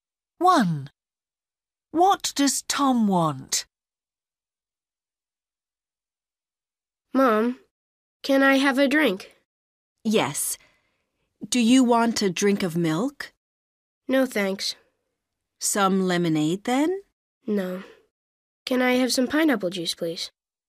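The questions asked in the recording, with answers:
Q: What does Tom want?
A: pineapple juice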